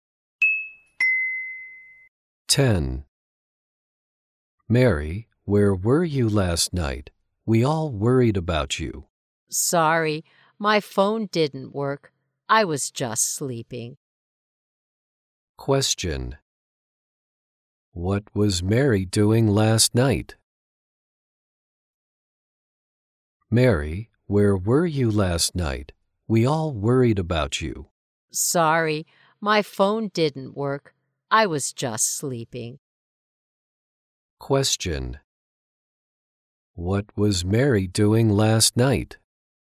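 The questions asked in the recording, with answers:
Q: What was Mary doing last night?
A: Sleeping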